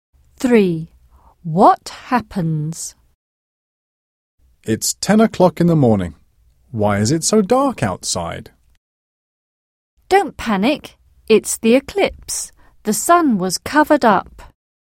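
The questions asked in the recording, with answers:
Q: What happens?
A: a solar eclipse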